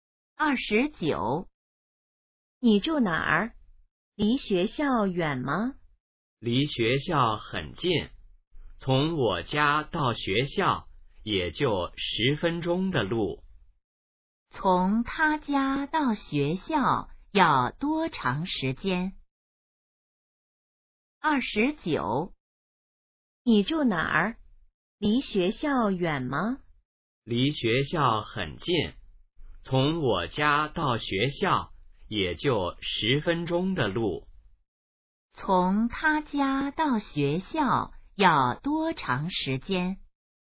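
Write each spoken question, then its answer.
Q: 从他家到学校要多长时间?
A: 10分钟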